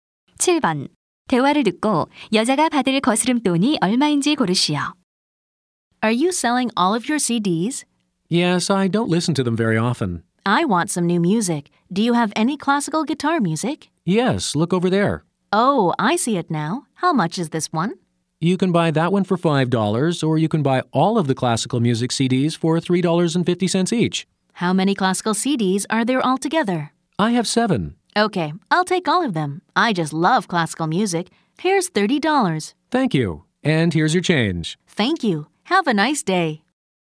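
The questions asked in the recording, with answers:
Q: 대화를 듣고 여자가 받을 거스름 돈이 얼마인지 고르시오.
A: 5달러 50센트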